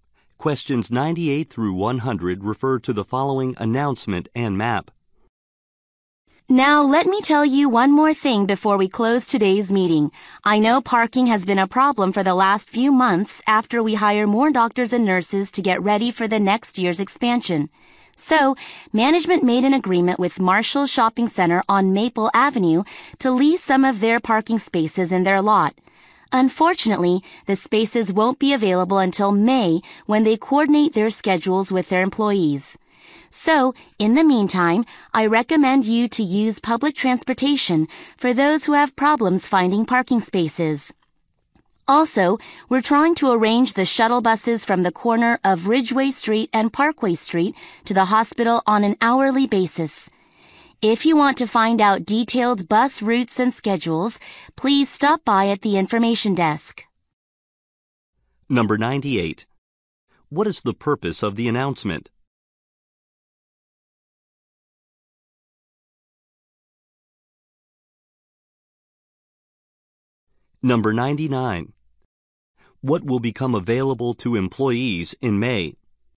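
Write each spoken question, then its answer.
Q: What is the purpose of the announcement?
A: To address the parking problem

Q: What will become available to employees in May?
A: Parking spaces at Marshall Shopping Center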